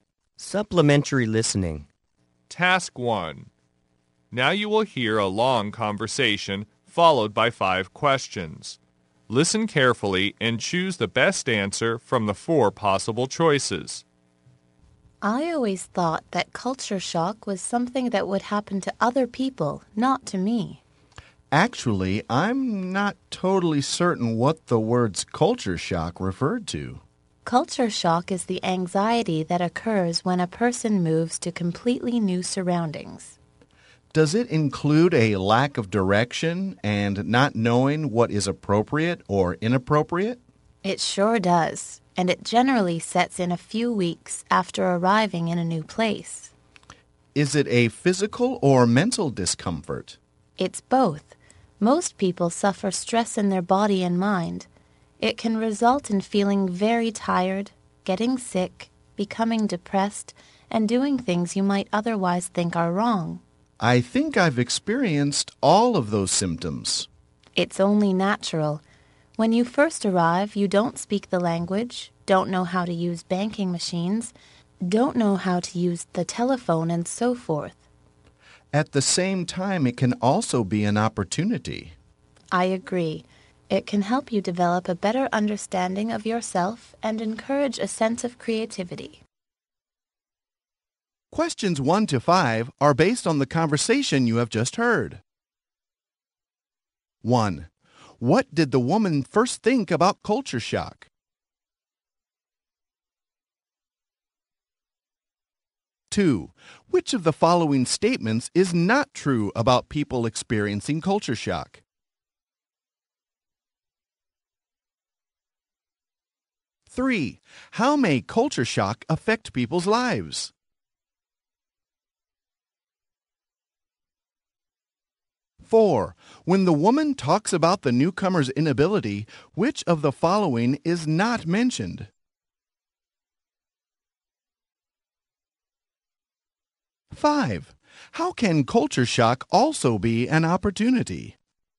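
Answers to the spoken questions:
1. It would happen to other people, not to her
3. Tiredness, sickness, depression, doing wrong things
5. It helps you understand yourself better and encourages creativity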